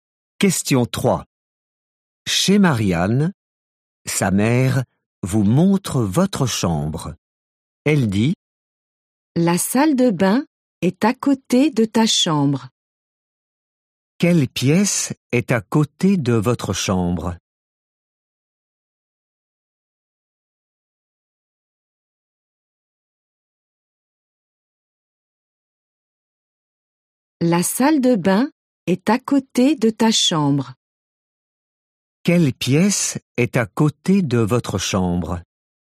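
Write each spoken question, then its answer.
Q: Quelle pièce est à côté de votre chambre ?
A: La salle de bain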